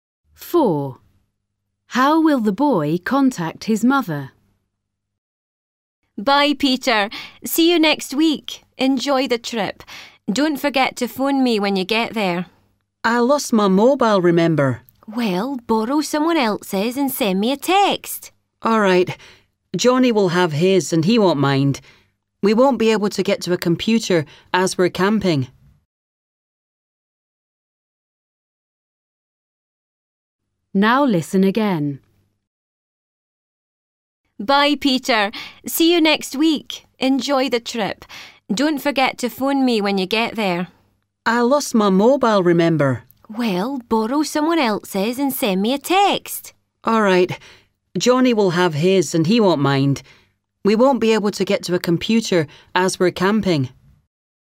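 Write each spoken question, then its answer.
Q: How will the boy contact his mother?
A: by sending a text from Johnny's mobile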